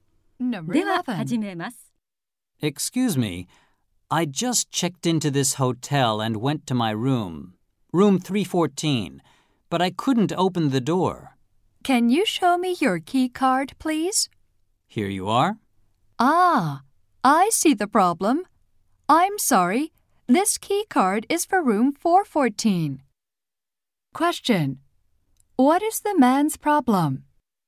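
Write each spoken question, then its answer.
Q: Question: What is the man's problem?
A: He was given the key card for the wrong room.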